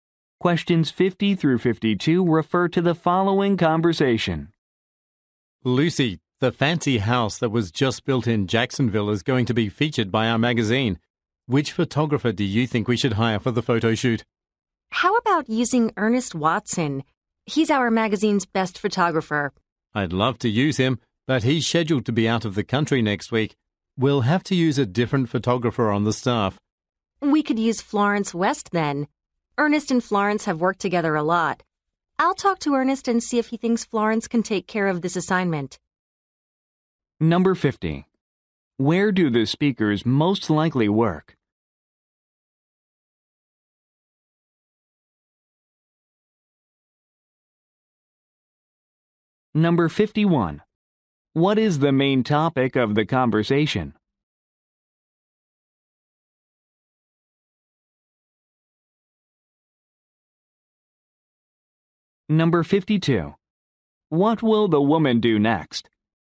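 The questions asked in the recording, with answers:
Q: Where do the speakers most likely work?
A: At a magazine

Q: What is the main topic of the conversation?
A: Choosing a photographer for a photo shoot

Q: What will the woman do next?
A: Talk to Ernest about Florence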